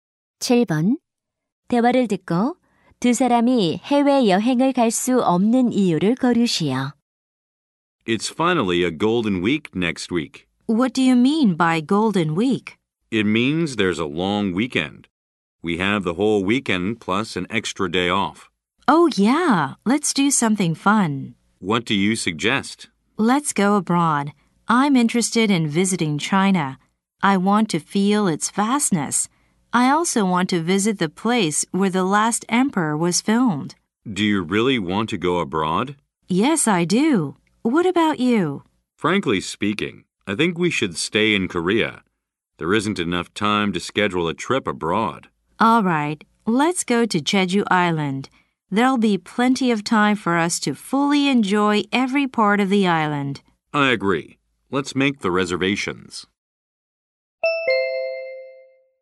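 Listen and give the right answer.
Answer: 해외여행 일정을 짜기에 시간이 부족해서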